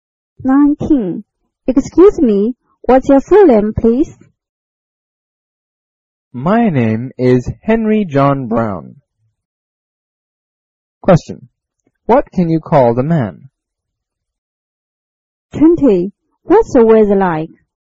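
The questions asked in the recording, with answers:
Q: What can you call the man?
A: Mr. Brown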